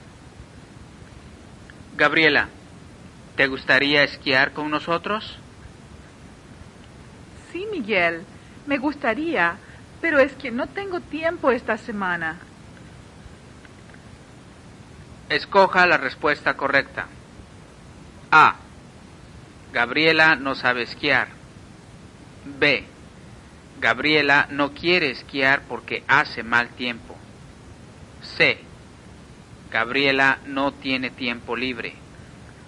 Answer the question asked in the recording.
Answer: La respuesta correcta es C.